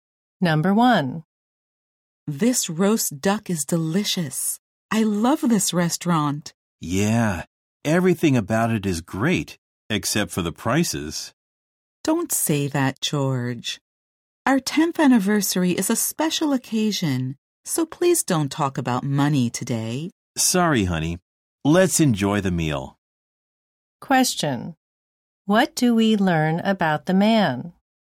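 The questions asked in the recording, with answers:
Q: What do we learn about the man?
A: He thinks the restaurant's prices are high (it is his 10th anniversary).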